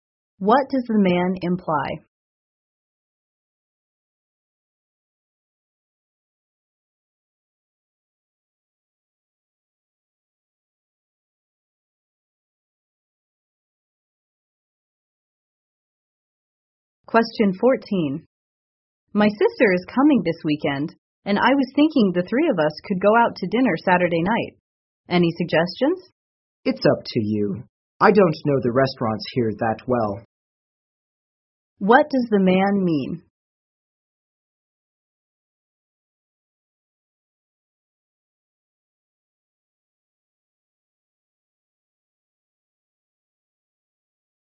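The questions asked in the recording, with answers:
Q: What does the man mean?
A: The woman should choose the restaurant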